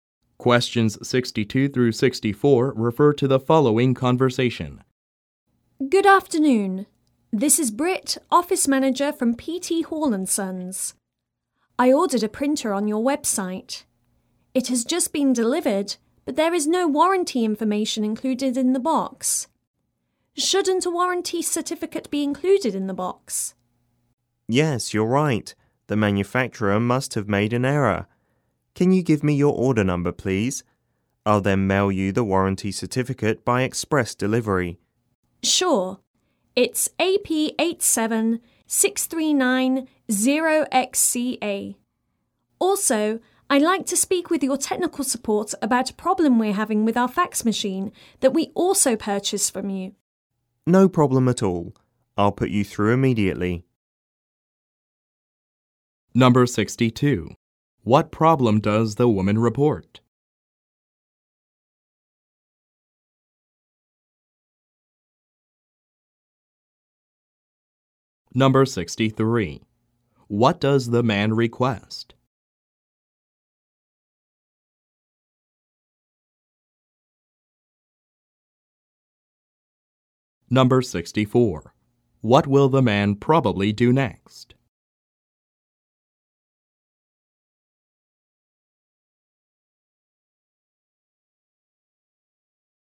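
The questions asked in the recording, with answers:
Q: What problem does the woman report?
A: The warranty information was not included with the printer she ordered.

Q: What does the man request?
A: Her order number.

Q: What will the man probably do next?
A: Put her through to technical support.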